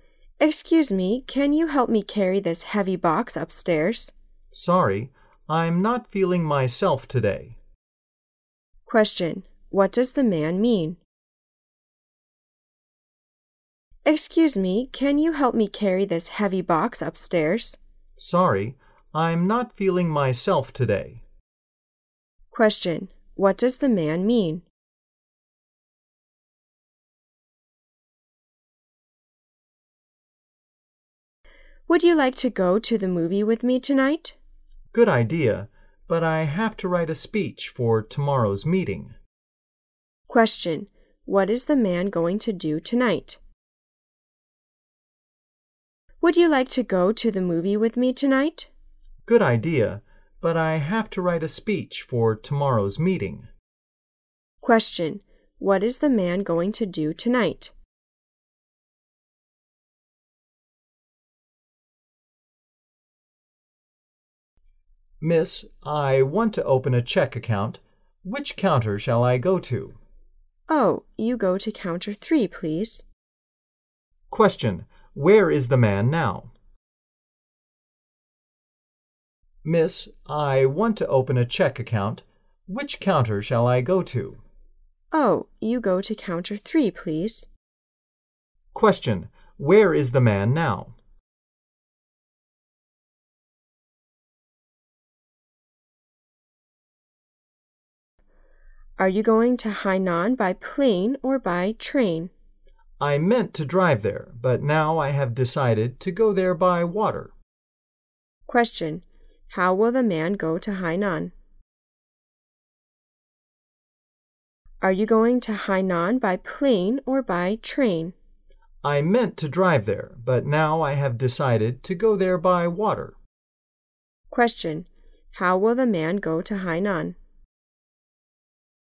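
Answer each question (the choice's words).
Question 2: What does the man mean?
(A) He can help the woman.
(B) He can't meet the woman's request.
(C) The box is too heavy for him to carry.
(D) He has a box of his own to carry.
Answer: He can't meet the woman's request.

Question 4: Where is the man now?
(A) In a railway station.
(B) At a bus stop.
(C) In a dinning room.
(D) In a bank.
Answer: In a bank.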